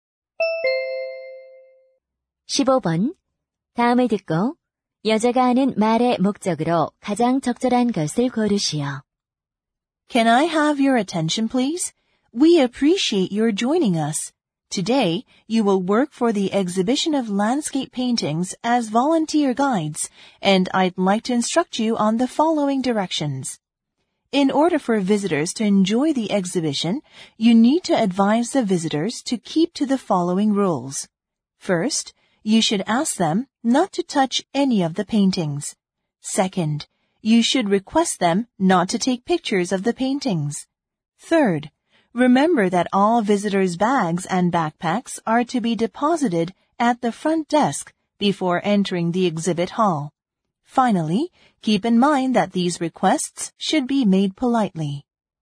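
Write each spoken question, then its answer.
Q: 다음을 듣고 여자가 하는 말의 목적으로 가장 적절한 것을 고르시오.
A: 자원봉사 안내원들에게 관람객 준수 사항을 안내하려고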